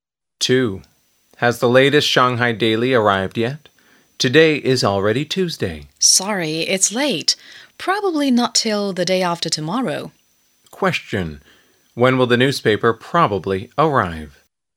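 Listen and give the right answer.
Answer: On Thursday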